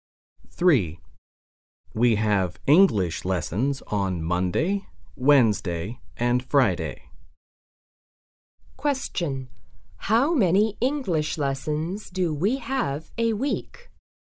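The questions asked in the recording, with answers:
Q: How many English lessons do we have a week?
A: Three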